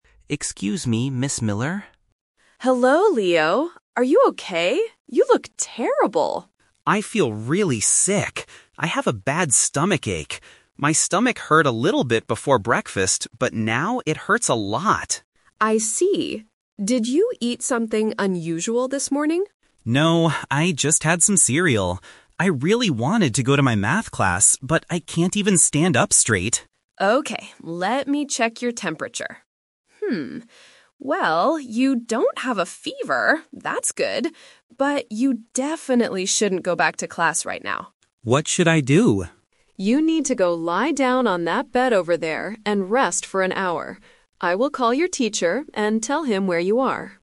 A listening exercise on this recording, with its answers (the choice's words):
Listen to a conversation between a student and a school nurse. Choose the correct answer (A, B, or C) for each question.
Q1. What is the boy's main health problem?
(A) He has a very high fever.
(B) His stomach hurts a lot.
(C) He is hungry because he missed breakfast.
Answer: His stomach hurts a lot.

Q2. What did the boy originally want to do?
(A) Call his math teacher.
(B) Lie down on a bed and sleep.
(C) Go to his math class.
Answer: Go to his math class.

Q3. What does the nurse tell the boy to do now?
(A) Rest on a bed in the clinic.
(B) Go back to his classroom immediately.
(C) Take some stomach medicine.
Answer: Rest on a bed in the clinic.

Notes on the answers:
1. The boy clearly states, "I have a bad stomachache... now it hurts a lot." The Trap: Option A is a trap. The nurse checks his temperature but explicitly says, "you don't have a fever." Option C is incorrect because he says he "had some cereal" (he ate breakfast).
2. The boy says, "I really wanted to go to my math class..." This was his original plan. The Trap: Option A is a trap. The nurse is the one who will "call your teacher," not the boy. Option B is also a trap; lying down is what the nurse tells him to do now, not what he originally wanted to do.
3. The nurse says, "You need to go lie down on that bed over there and rest for an hour." The Trap: Option B is the exact opposite of what the nurse says ("you definitely shouldn't go back to class right now"). Option C is a plausible action in real life when you have a stomachache, but the nurse never mentions medicine in the audio.

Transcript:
Nurse: Hello, Leo. Are you okay? You look terrible.
Student: I feel really sick. I have a bad stomachache. My stomach hurt a little bit before breakfast, but now it hurts a lot.
Nurse: I see. Did you eat something unusual this morning?
Student: No, I just had some cereal. I really wanted to go to my math class, but I can't even stand up straight.
Nurse: Okay, let me check your temperature. well, you don't have a fever. That's good. But you definitely shouldn't go back to class right now.
Student: What should I do?
Nurse: You need to go lie down on that bed over there and rest for an hour. I will call your teacher and tell him where you are.